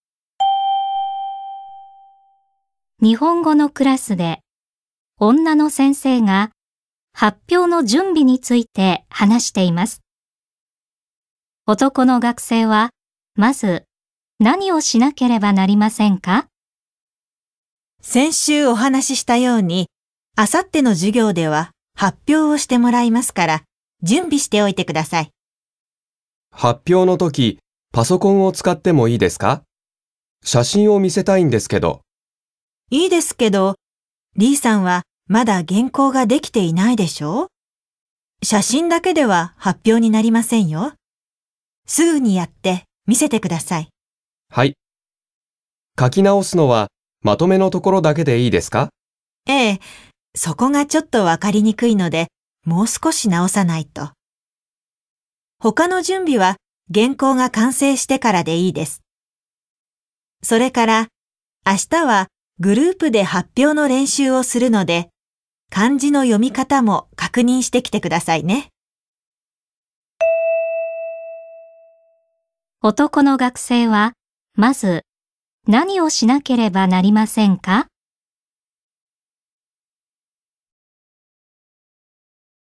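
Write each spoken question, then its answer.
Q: 男の学生は、まず、何をしなければなりませんか?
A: 原稿のまとめの部分を書き直す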